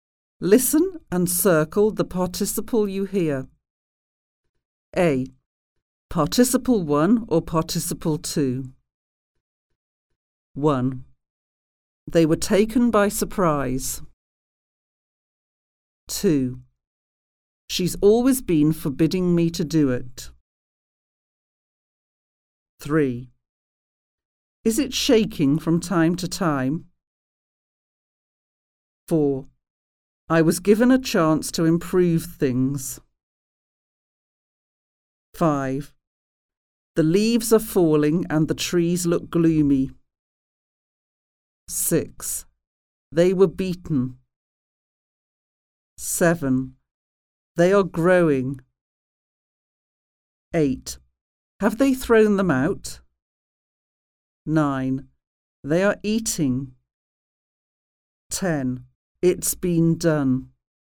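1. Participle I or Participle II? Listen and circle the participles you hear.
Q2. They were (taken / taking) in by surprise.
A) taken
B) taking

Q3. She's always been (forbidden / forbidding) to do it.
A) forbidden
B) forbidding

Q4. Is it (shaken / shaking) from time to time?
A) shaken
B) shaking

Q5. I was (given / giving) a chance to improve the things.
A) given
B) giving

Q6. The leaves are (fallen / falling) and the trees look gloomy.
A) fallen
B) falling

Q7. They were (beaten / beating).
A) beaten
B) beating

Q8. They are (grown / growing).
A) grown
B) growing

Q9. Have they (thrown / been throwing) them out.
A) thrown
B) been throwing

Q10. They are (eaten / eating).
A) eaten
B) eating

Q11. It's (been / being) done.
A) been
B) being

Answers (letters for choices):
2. A
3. B
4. B
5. A
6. B
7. A
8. B
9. A
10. B
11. A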